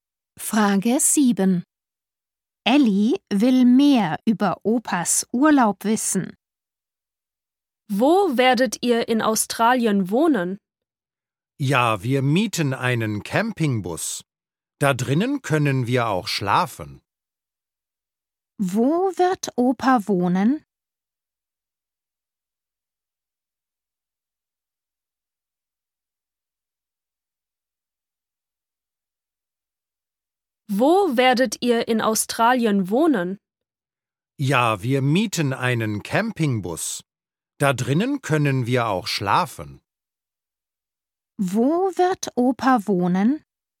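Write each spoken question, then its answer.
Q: Wo wird Opa wohnen?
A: in einem Campingbus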